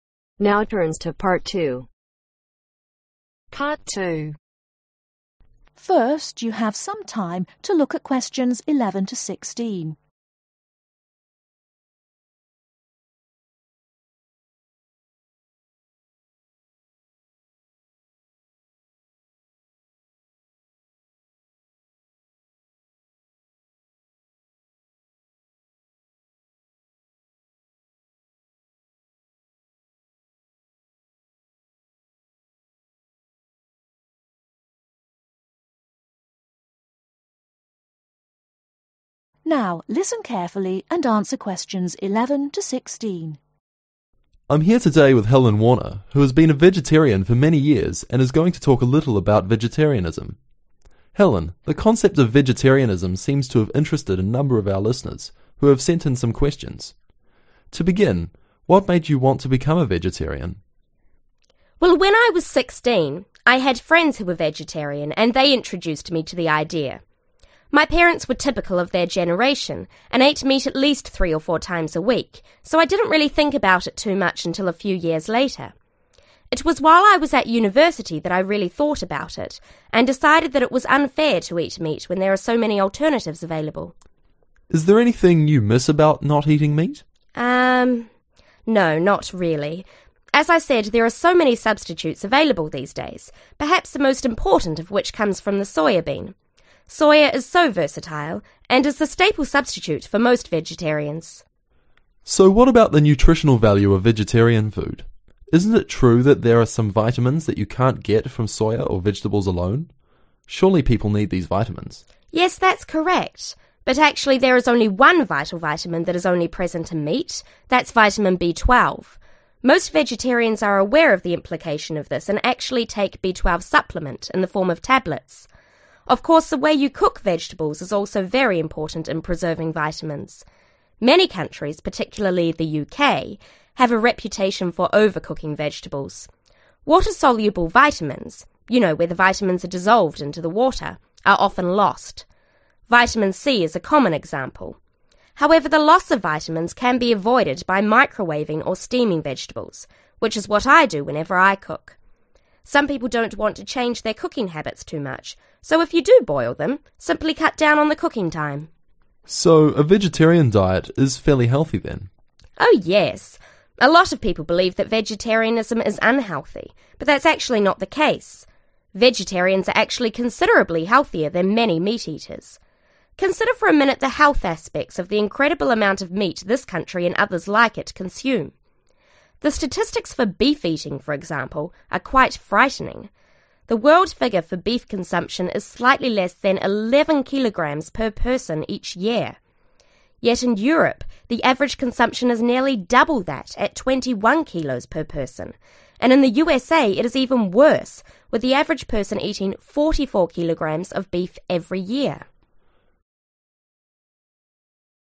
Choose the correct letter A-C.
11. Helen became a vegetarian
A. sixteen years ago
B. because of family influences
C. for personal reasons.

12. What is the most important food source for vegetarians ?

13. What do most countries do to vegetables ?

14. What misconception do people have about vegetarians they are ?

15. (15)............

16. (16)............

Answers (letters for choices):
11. C
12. Soya (bean)
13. Overcook (them)
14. Unhealthy
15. 21
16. 44